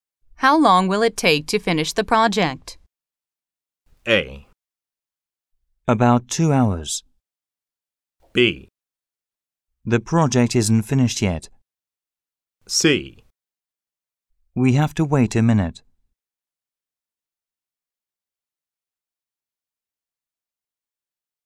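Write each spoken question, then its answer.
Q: How long will it take to finish the project?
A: A: About 2 hours.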